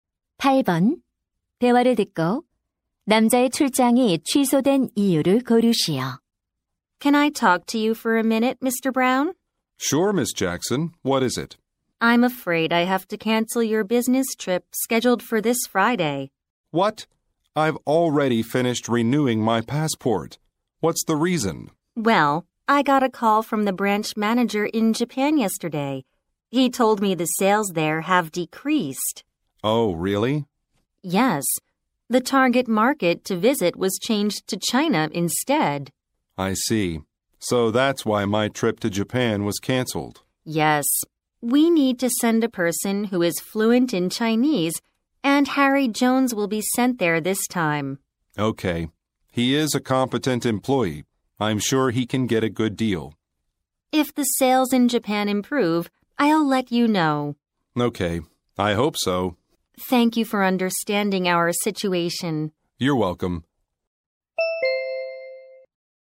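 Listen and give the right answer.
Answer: 일본 매출 감소로 목표 시장이 중국으로 바뀌어서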